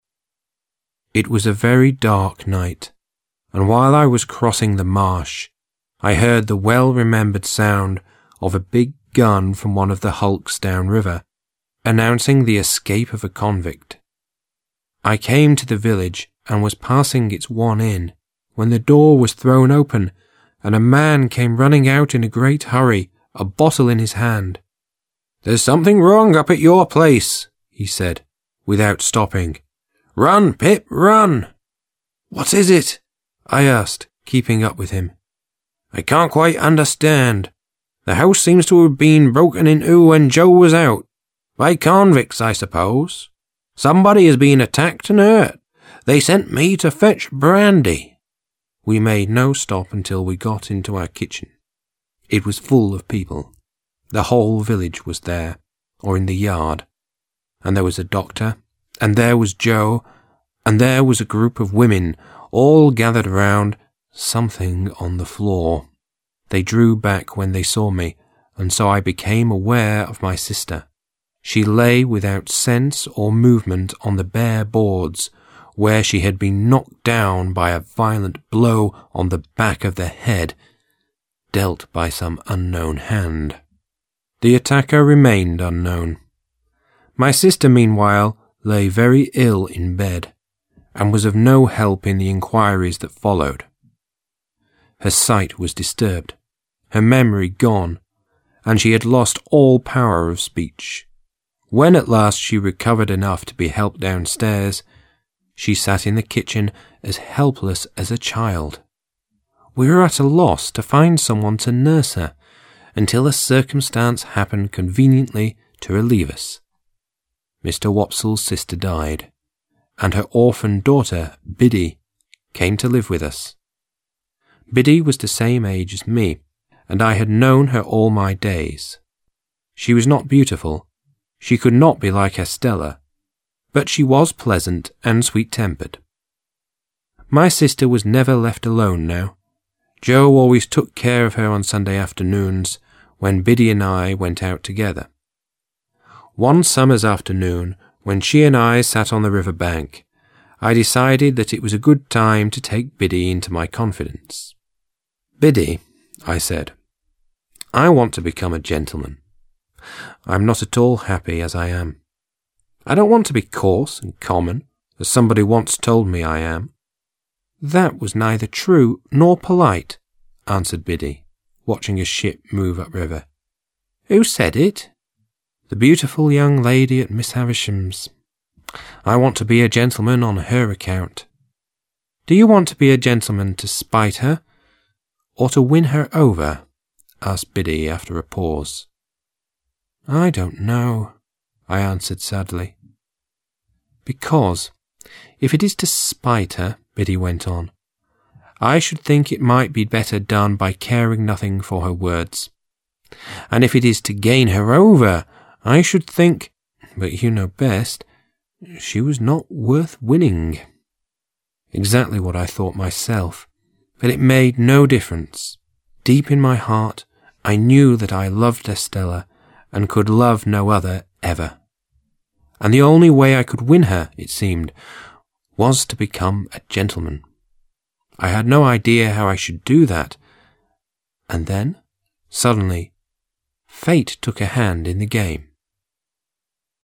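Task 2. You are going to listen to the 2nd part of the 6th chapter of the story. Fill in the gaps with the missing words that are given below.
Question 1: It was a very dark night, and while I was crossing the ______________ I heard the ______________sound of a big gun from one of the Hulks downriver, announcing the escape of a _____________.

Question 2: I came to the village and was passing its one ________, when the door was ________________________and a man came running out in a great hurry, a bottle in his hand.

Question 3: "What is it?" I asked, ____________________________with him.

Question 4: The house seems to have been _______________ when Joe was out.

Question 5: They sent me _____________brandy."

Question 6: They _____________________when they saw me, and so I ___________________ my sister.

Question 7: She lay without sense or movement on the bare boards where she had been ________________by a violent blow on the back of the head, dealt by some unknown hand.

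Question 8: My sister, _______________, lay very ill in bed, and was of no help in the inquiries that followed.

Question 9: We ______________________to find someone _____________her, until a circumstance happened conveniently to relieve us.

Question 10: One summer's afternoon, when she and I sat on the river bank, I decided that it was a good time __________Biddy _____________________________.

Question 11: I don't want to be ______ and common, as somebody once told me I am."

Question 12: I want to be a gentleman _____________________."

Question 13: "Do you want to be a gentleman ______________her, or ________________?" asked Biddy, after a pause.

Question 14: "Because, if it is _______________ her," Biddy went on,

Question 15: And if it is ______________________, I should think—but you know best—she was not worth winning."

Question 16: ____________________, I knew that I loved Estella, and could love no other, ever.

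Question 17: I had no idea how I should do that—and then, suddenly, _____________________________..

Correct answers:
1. marsh, well-remembered, convict
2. inn, thrown open
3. keeping up
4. broken into
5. to fetch
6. drew back, became aware of
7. knocked down
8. meanwhile
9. were at a loss, to nurse
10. to take, into my confidence
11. coarse
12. on her account
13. to spite, to win her over
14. to spite
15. to gain her over
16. Deep in my heart
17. fate took a hand in the game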